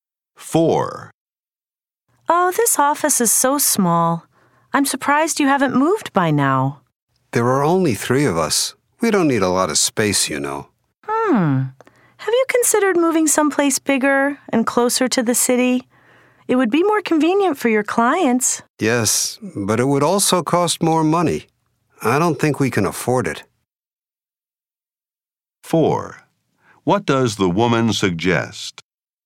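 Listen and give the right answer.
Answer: Moving to a bigger office closer to the city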